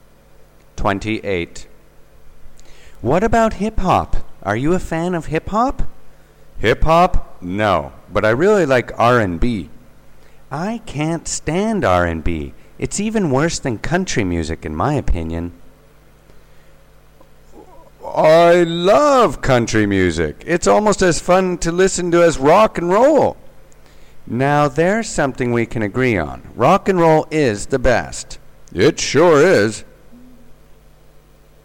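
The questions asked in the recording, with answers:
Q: What is this conversation mainly about?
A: Their tastes in music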